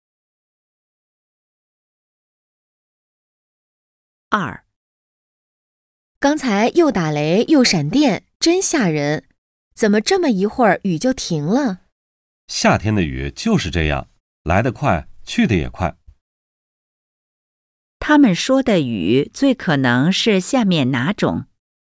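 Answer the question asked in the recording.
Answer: 雷阵雨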